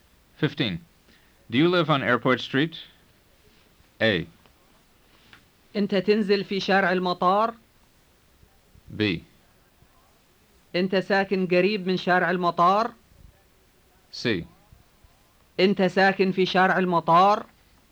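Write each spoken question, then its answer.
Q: Do you live on Airport Street?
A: C: أنت ساكن في شارع المطار؟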